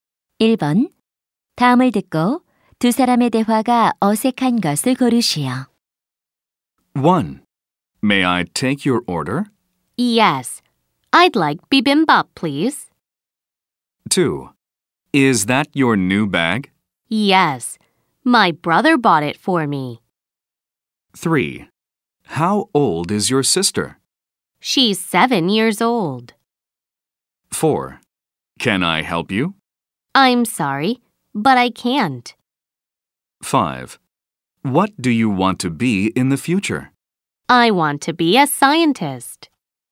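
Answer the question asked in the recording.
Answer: 4: Can I help you? - I'm sorry, but I can't.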